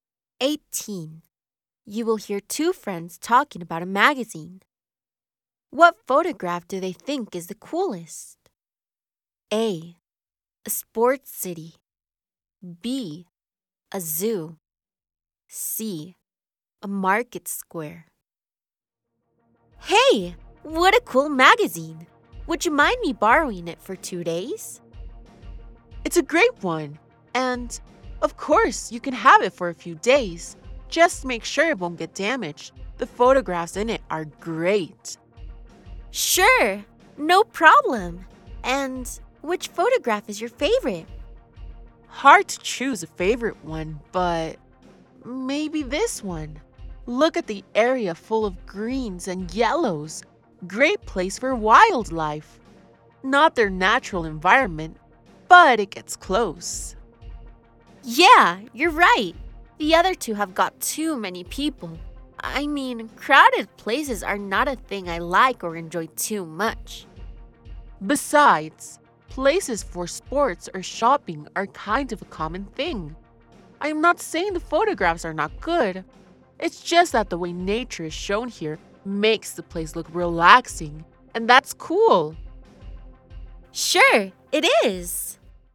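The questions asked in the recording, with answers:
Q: What photograph do they think is the coolest?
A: B: A zoo.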